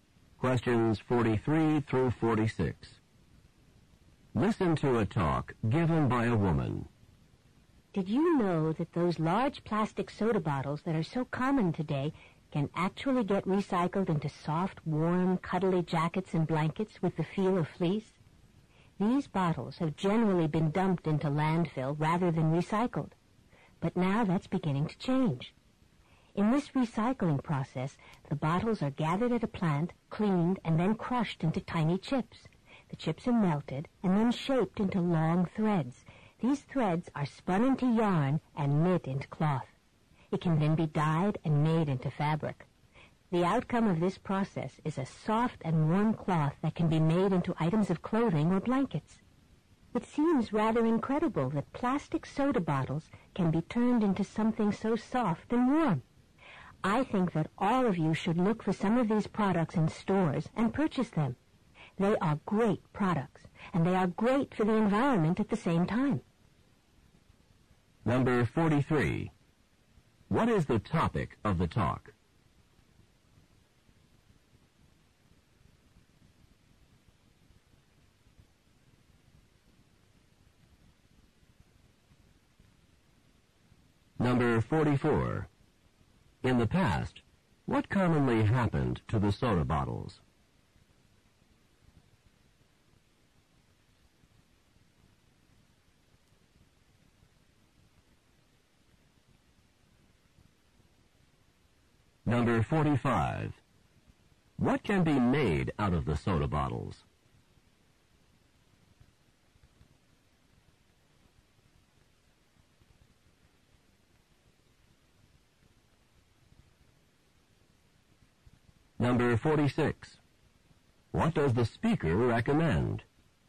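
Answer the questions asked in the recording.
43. Recycling plastic soda bottles into fabric
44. They were dumped into landfills
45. Jackets and blankets
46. Looking for these products in stores and buying them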